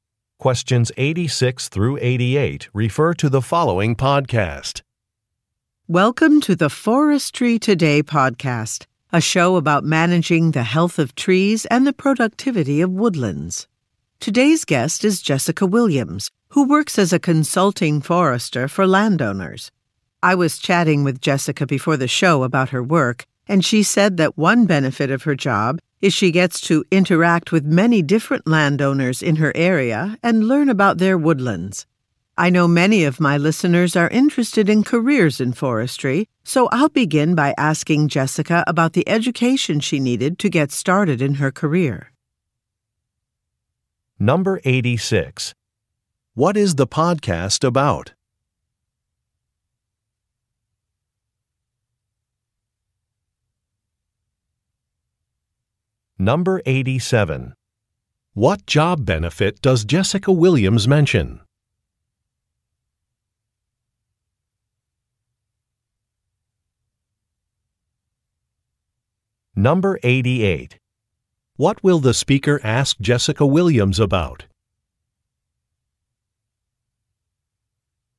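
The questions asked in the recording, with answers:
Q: What is the podcast about?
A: Forestry / managing trees and woodlands

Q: What job benefit does Jessica Williams mention?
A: Interacting with many different landowners

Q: What will the speaker ask Jessica Williams about?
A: The education she needed for her career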